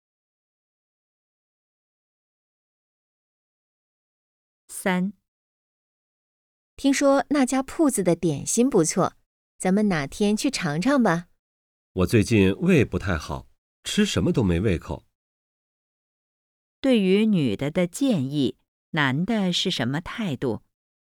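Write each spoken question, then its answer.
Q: 对于女的的建议,男的是什么态度?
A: 不想去(胃不好,没胃口)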